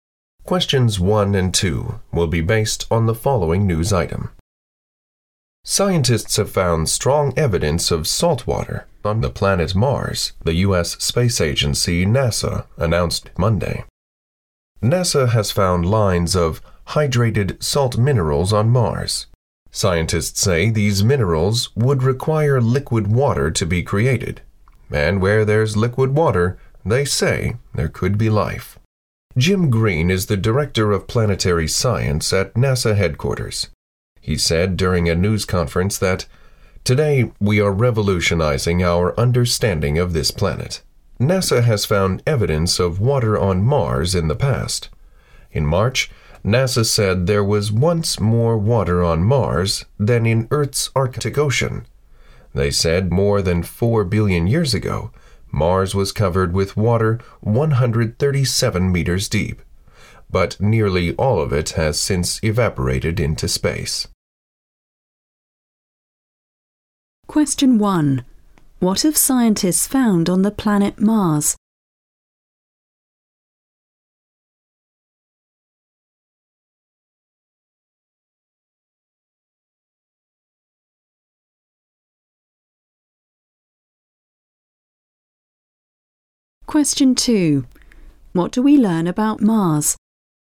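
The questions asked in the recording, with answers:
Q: What have scientists found on the planet Mars?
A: Strong evidence of salt water (hydrated salt minerals)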